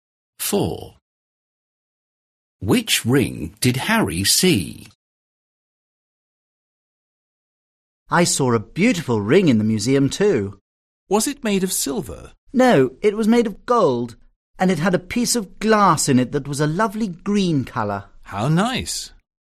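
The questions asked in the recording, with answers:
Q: Which ring did Harry see?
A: a gold ring with green glass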